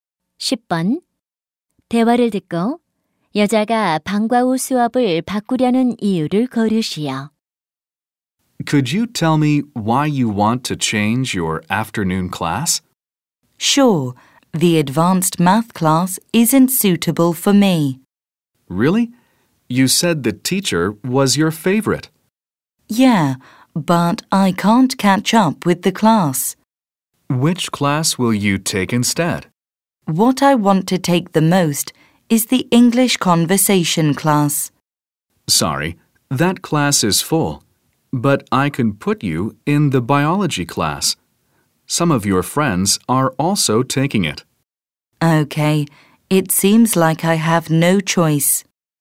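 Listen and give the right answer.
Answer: 고급 수학 수업을 따라갈 수 없어서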